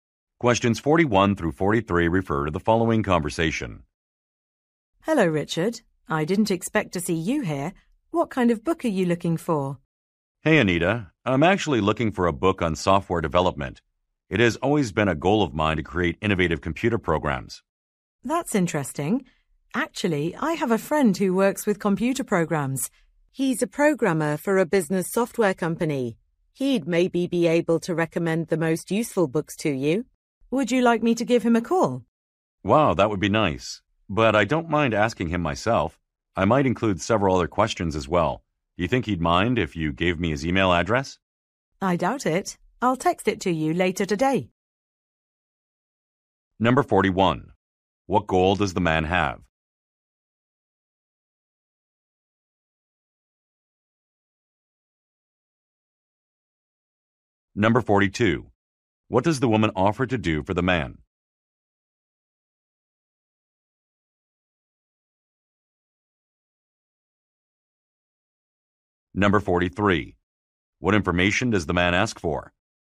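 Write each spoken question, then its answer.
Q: What goal does the man have?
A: To create innovative computer programs

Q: What does the woman offer to do for the man?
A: Call her programmer friend

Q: What information does the man ask for?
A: The friend's email address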